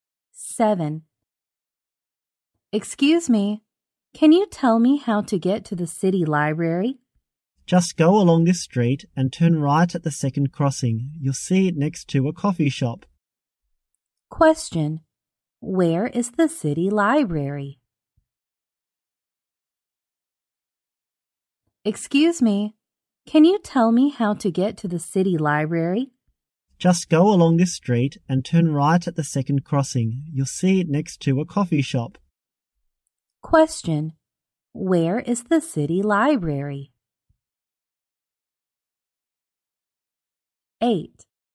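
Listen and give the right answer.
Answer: Next to a coffee shop, turn right at the second crossing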